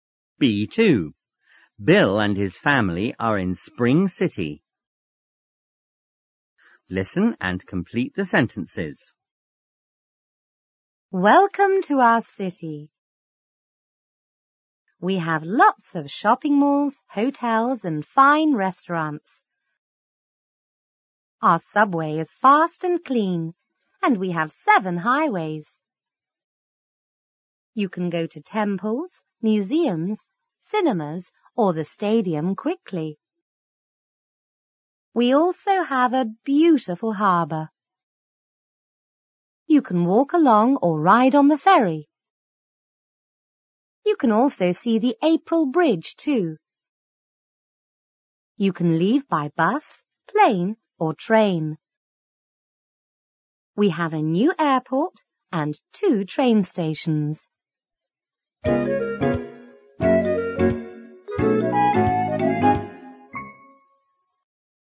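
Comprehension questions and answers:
Listen and complete the sentences.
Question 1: We have losts of shopping ( ),hotels and fine ( ).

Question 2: Our ( ) is fast and ( ) and we have ( ).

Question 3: You can go to temples,museums,cinemas or the ( ) quickly.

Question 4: We also have a beautiful ( ).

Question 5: You can walk along or ( ) on the ( ).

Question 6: You can also see the April ( ),too.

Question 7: We have a new airport and ( ) train ( ).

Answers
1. malls; restaurants
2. subway; clean; 7 highways
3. stadium
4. harbour
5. ride; ferry
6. Bridge
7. 2; stations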